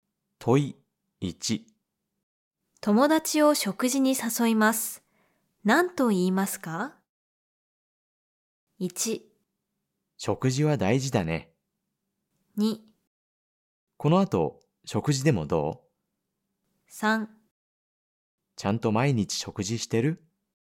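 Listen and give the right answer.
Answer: 2: この後食事でもどう?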